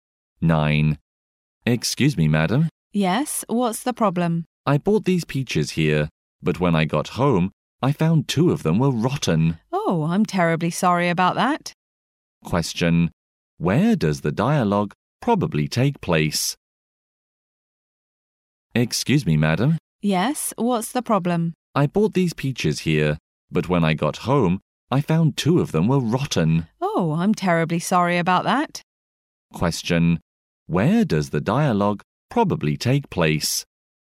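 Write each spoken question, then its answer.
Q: Where does the dialogue probably take place?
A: In a shop (fruit store)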